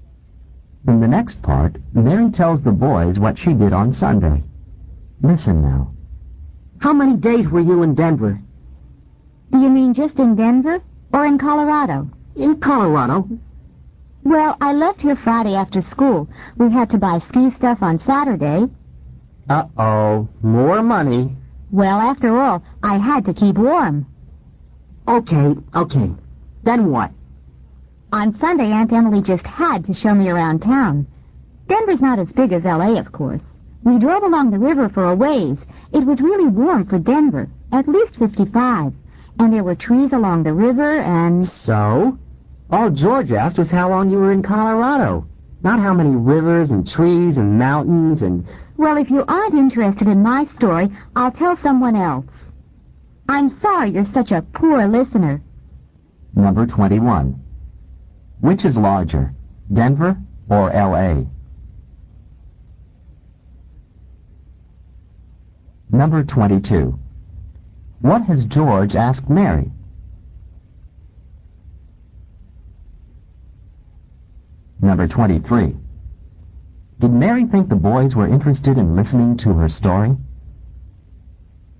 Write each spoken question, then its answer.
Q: Which is larger, Denver or L.A.?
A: L.A. is.

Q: What has George asked Mary?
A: he'd asked her how long she was in Colorado.

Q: Did Mary think the boys were interested in listening to her story?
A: The answer is B, no she didn't.